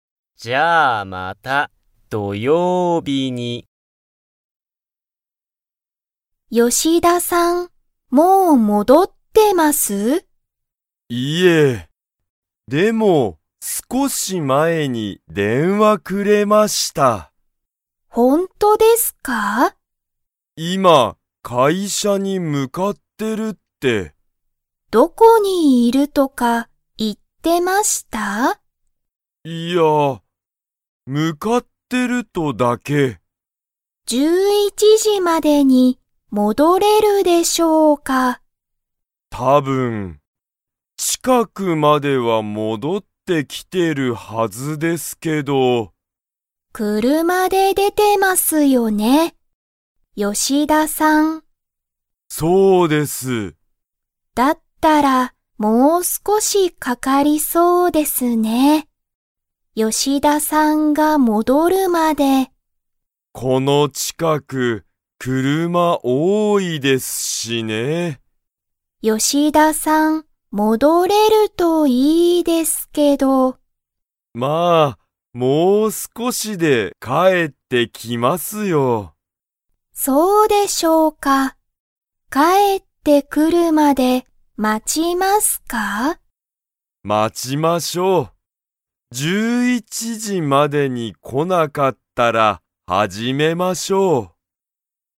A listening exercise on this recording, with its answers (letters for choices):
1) 吉田(よしだ)さんは、もう戻(もど)ってますか?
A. はい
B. いいえ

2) この近(ちか)くは、____が多(おお)い。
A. 車(くるま)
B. 電話(でんわ)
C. 仕事(しごと)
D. 会社(かいしゃ)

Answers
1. B
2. A

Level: Level 2